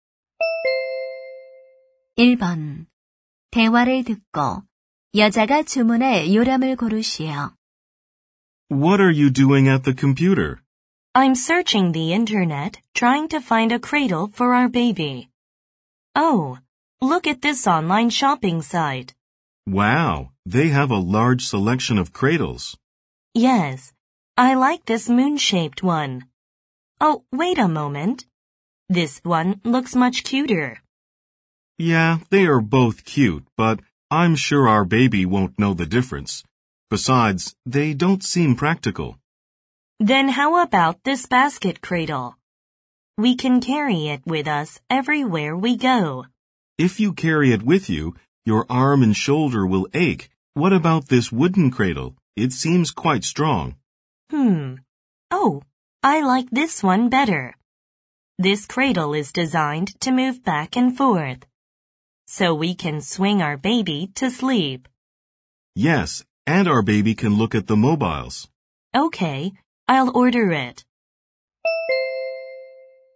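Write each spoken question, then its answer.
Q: 대화를 듣고 여자가 주문할 요람을 고르시오.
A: 앞뒤로 흔들리는 나무 요람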